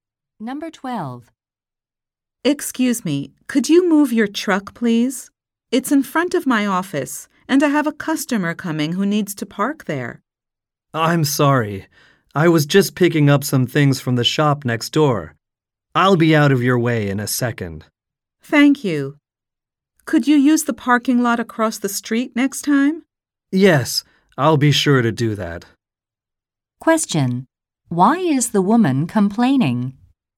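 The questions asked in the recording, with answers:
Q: Why is the woman complaining?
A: The man's truck is parked in front of her office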